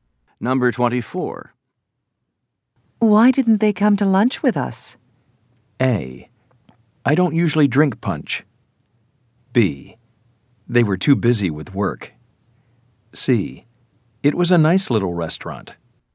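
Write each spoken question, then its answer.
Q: Why didn't they come to lunch with us?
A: B: They were too busy with work.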